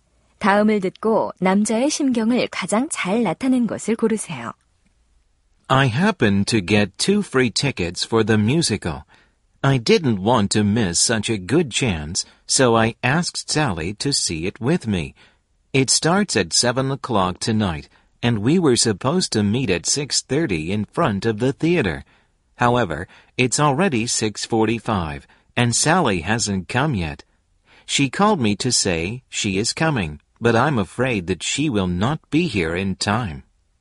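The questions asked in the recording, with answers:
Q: 다음을 듣고 남자의 심경을 가장 잘 나타낸 것을 고르세요.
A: 걱정스러움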